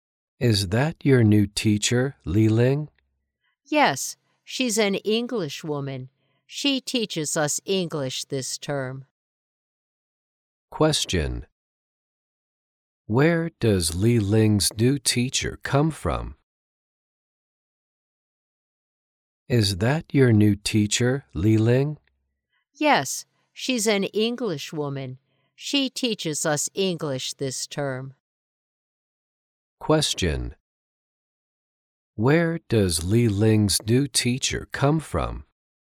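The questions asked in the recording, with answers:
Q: Where does Li Ling's new teacher come from?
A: England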